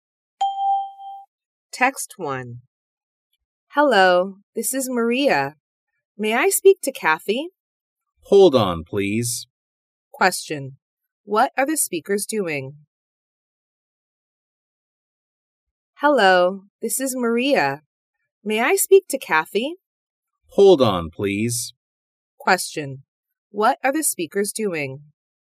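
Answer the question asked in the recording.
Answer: Talking on the phone.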